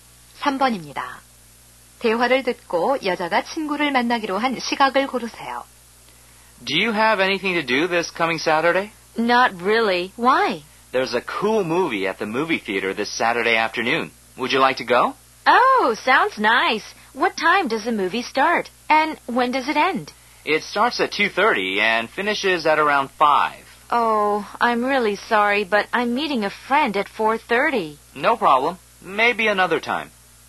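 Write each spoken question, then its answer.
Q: 대화를 듣고 여자가 친구를 만나기로 한 시각을 고르세요.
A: 4시 30분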